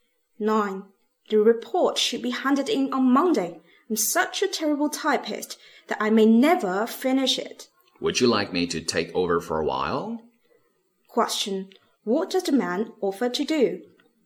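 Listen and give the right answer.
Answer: Type the report for her for a while.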